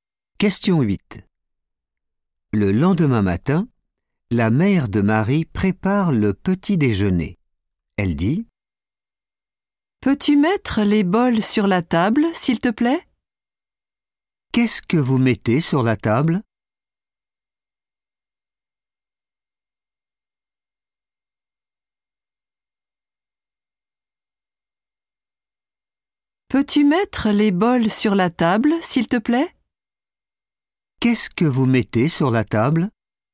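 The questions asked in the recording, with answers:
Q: Qu'est-ce que vous mettez sur la table ?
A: les bols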